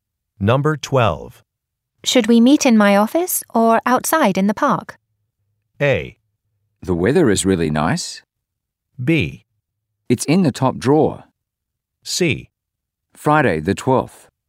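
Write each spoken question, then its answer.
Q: Should we meet in my office or outside in the park?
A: A: The weather is really nice.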